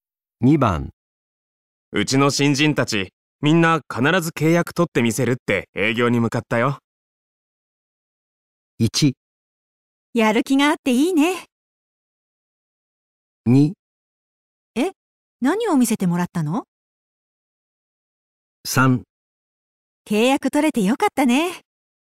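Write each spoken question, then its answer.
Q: うちの新人たち、みんな必ず契約取ってみせるって営業に向かったよ。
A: 1: やる気があっていいね。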